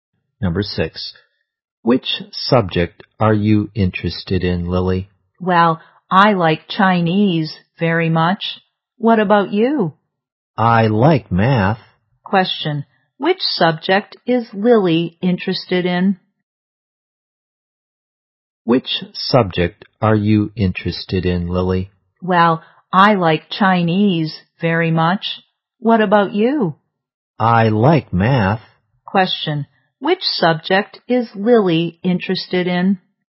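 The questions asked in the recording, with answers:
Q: which subject is Lily interested in?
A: Chinese.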